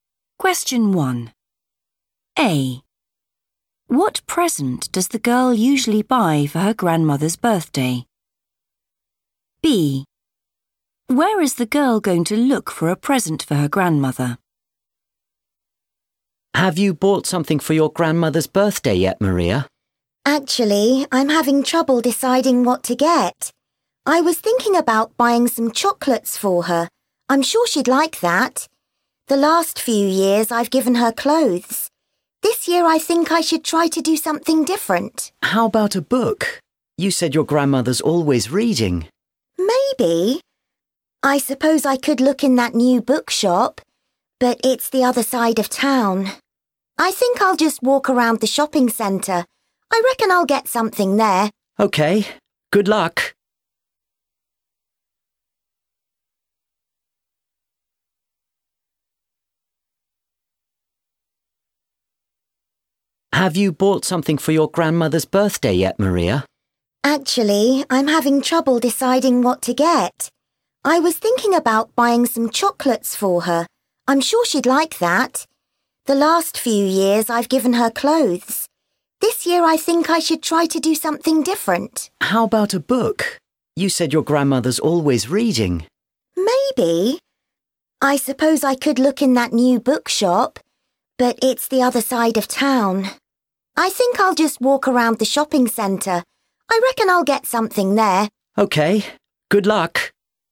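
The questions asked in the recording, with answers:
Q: What present does the girl usually buy for her grandmother's birthday?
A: clothes

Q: Where is the girl going to look for a present for her grandmother?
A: the shopping centre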